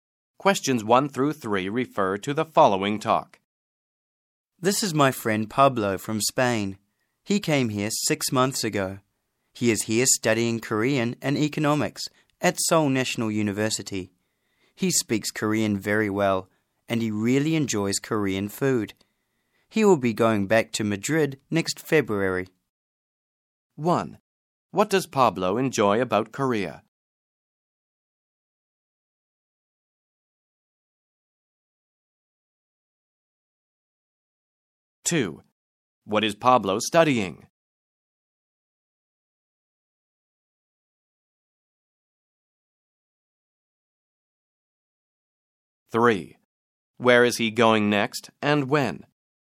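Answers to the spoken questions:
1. Korean food
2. Korean and economics
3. Back to Madrid next February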